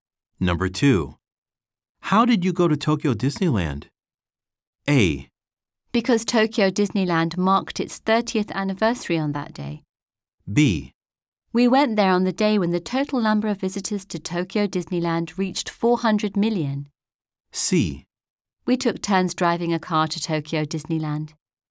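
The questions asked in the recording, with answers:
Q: How did you go to Tokyo Disneyland?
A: C: We took turns driving a car to Tokyo Disneyland.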